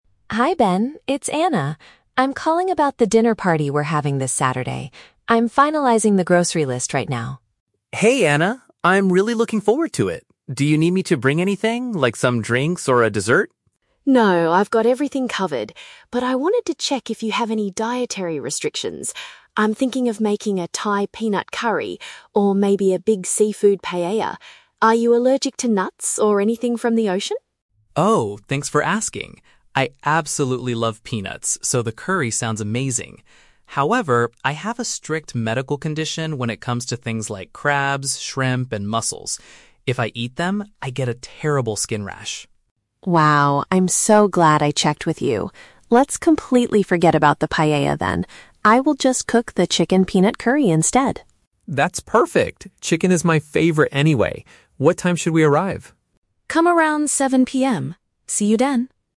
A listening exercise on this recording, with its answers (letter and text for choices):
Listen to a phone conversation between a host and a guest. For each question, choose the correct answer (A, B, or C).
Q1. Why is Anna contacting Ben?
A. To ask him to purchase some items at the grocery store.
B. To find out if he has any specific health issues with food.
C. To invite him to a restaurant that serves traditional Thai meals.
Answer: B. To find out if he has any specific health issues with food.

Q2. What type of food must Ben completely avoid eating?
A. Dishes that contain nuts like peanuts.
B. Poultry meats such as grilled chicken.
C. Animals that live in the water.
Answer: C. Animals that live in the water.

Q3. What will Anna prepare for the main meal on Saturday?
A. A mixed dish featuring various kinds of shellfish.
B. A bird meat dish flavored with a type of nut.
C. A sweet dessert accompanied by some drinks.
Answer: B. A bird meat dish flavored with a type of nut.

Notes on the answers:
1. Anna says she wants to check if he has any "dietary restrictions" (health issues with food). Option (A) is a trap; she is making a "grocery list" and Ben offers to bring drinks, but Anna says "I've got everything covered." Option (C) is a trap; she is cooking "Thai peanut curry" at her house, not taking him to a restaurant.
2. Ben states he has a strict medical condition regarding "things like crabs, shrimp, and mussels" (animals that live in the water) and gets a rash from them. Option (A) is a trap; she asks about nuts, but Ben says he "absolutely loves peanuts." Option (B) is a trap; chicken is his "favorite."
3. Anna decides to cook the "chicken peanut curry" (a bird meat dish flavored with a nut). Option (A) is a trap; she thought about making a "seafood paella" but decided to "completely forget about" it because of Ben's allergy. Option (C) is a trap; Ben offered to bring a dessert, but Anna declined.

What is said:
Anna: Hi Ben, it's Anna. I'm calling about the dinner party we're having this Saturday. I'm finalizing the grocery list right now.
Ben: Hey Anna! I'm really looking forward to it. Do you need me to bring anything, like some drinks or a dessert?
Anna: No, I've got everything covered! But I wanted to check if you have any dietary restrictions. I'm thinking of making a Thai peanut curry or maybe a big seafood paella. Are you allergic to nuts or anything from the ocean?
Ben: Oh, thanks for asking! I absolutely love peanuts, so the curry sounds amazing. However, I have a strict medical condition when it comes to things like crabs, shrimp, and mussels. If I eat them, I get a terrible skin rash.
Anna: Wow, I'm so glad I checked with you. Let's completely forget about the paella then. I will just cook the chicken peanut curry instead.
Ben: That's perfect. Chicken is my favorite anyway. What time should we arrive?